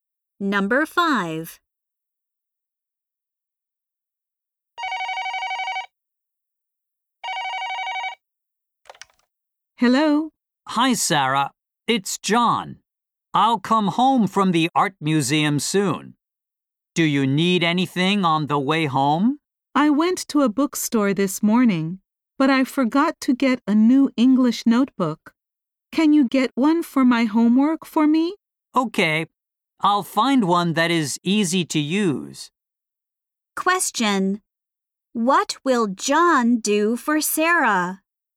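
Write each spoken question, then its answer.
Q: What will John do for Sarah?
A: Buy her a new English notebook.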